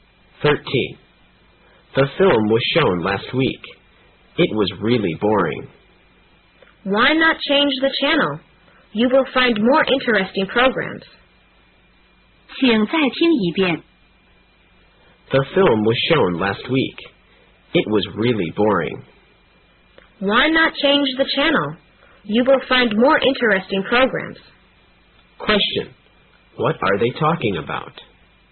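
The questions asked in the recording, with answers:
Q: What are they talking about?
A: A boring film on TV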